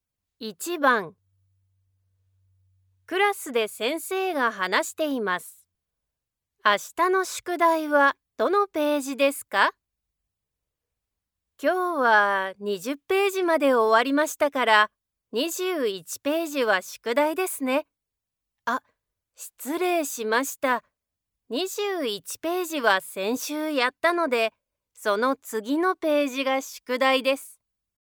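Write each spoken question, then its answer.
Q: 明日の宿題はどのページですか?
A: 22ページ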